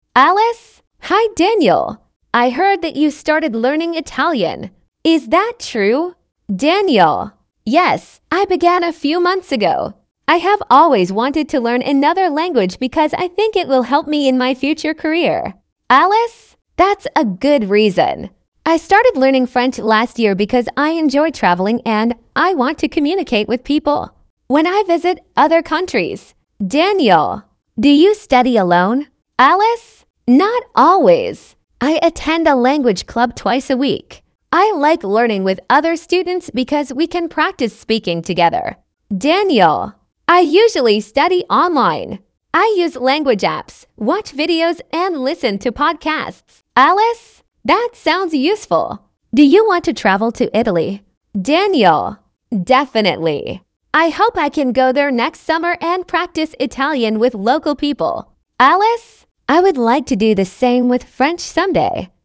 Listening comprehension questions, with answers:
Вы услышите диалог. Для каждого вопроса А–Е выберите один правильный вариант ответа из трёх предложенных (1, 2 или 3). Вы услышите запись дважды.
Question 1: Who has recently started learning a foreign language?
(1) Alice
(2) Daniel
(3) Both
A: (2) Daniel

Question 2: Who studies languages because of future career plans?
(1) Alice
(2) Daniel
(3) Neither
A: (2) Daniel

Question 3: Who wants to travel abroad to practise the language?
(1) Alice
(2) Daniel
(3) Both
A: (3) Both

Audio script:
Alice: Hi Daniel! I heard that you started learning Italian. Is that true?
Daniel: Yes, I began a few months ago. I have always wanted to learn another language because I think it will help me in my future career.
Alice: That's a good reason. I started learning French last year because I enjoy travelling and I want to communicate with people when I visit other countries.
Daniel: Do you study alone?
Alice: Not always. I attend a language club twice a week. I like learning with other students because we can practise speaking together.
Daniel: I usually study online. I use language apps, watch videos and listen to podcasts.
Alice: That sounds useful. Do you want to travel to Italy?
Daniel: Definitely. I hope I can go there next summer and practise Italian with local people.
Alice: I would like to do the same with French someday.

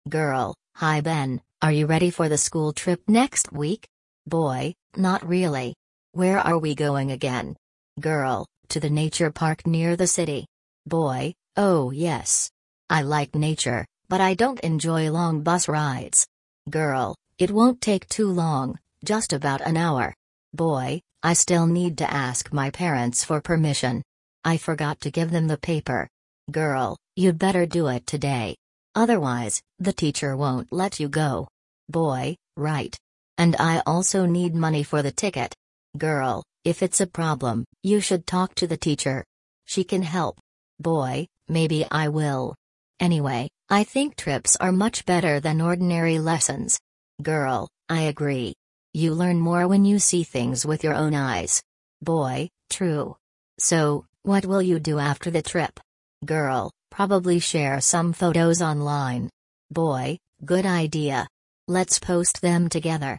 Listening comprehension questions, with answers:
You will hear a dialogue between two classmates preparing for a school trip. For questions A–E, choose the correct answer (1, 2 or 3).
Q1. Where is the school trip planned?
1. To a museum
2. To a theatre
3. To a nature park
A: 3. To a nature park

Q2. What advice does the girl give him?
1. Talk to the teacher about the problem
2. Borrow money from a classmate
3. Stay at school instead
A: 1. Talk to the teacher about the problem

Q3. What do they both agree about?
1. Trips are better than ordinary lessons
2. Trips are often tiring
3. Trips are only for younger students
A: 1. Trips are better than ordinary lessons

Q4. What do they decide to do after the trip?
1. Prepare a report for the class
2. Share photos online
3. Go shopping together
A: 2. Share photos online

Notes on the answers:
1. Girl: To the nature park near the city.
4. Girl: Probably share some photos online.

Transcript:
Girl: Hi Ben, are you ready for the school trip next week?
Boy: Not really. Where are we going again?
Girl: To the nature park near the city.
Boy: Oh yes. I like nature, but I don't enjoy long bus rides.
Girl: It won't take too long, just about an hour.
Boy: I still need to ask my parents for permission. I forgot to give them the paper.
Girl: You'd better do it today. Otherwise, the teacher won't let you go.
Boy: Right. And I also need money for the ticket.
Girl: If it's a problem, you should talk to the teacher. She can help.
Boy: Maybe I will. Anyway, I think trips are much better than ordinary lessons.
Girl: I agree. You learn more when you see things with your own eyes.
Boy: True. So, what will you do after the trip?
Girl: Probably share some photos online.
Boy: Good idea! Let's post them together.

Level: grade10

